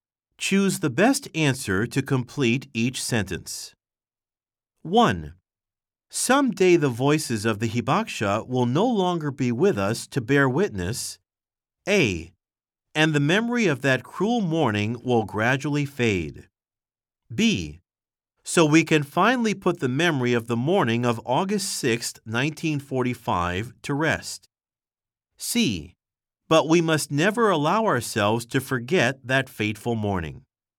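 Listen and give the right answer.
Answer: C: But we must never allow ourselves to forget that fateful morning.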